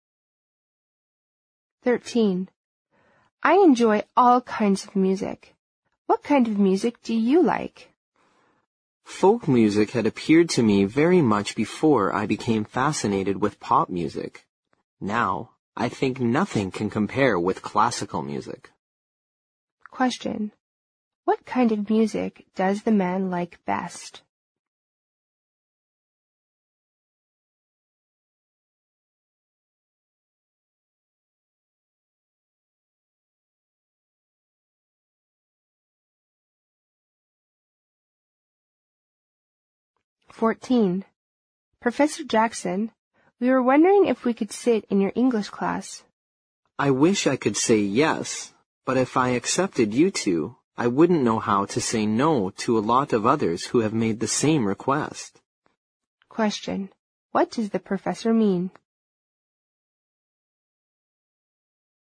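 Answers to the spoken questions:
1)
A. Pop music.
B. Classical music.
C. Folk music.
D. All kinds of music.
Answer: B. Classical music.
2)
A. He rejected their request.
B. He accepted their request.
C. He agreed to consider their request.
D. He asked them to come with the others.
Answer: A. He rejected their request.

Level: 六级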